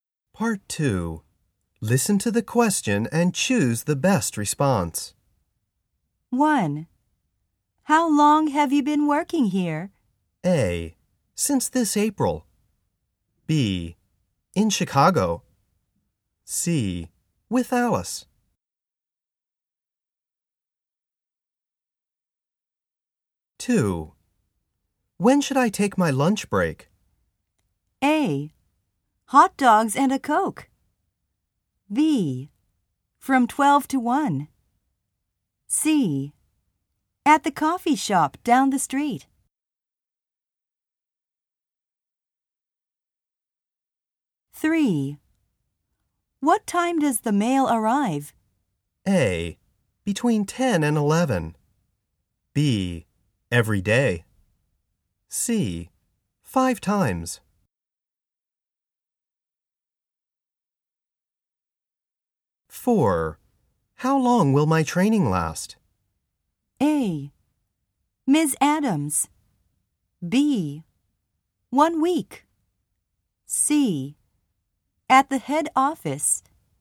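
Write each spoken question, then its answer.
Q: How long have you been working here?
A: A: Since this April.

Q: When should I take my lunch break?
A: B: From 12 to 1.

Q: What time does the mail arrive?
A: A: Between 10 and 11.

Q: How long will my training last?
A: B: 1 week.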